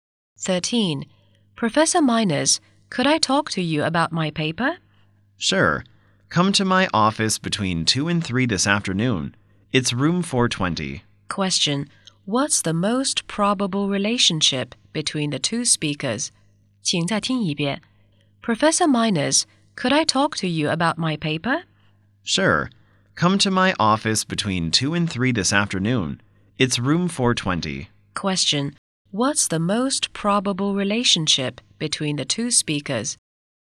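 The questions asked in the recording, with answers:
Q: What's the most probable relationship between the two speakers?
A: Professor and student.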